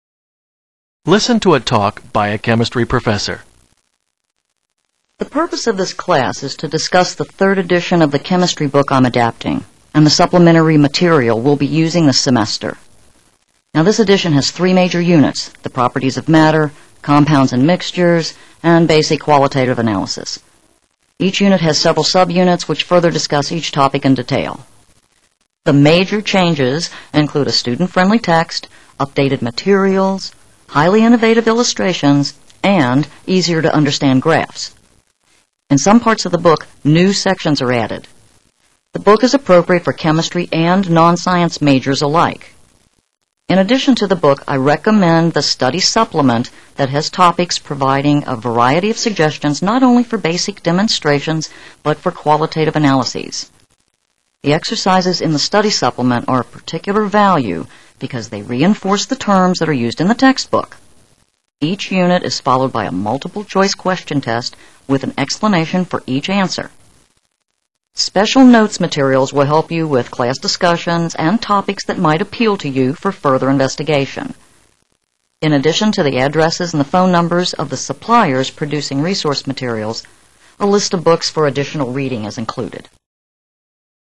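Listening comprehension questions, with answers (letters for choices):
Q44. In what way are the exercises most valuable?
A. They help students master the meaning of the new words.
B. They promote open-ended questions.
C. They provide background knowledge for topics used in class discussions.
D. They steer students to conduct independent experiments.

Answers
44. A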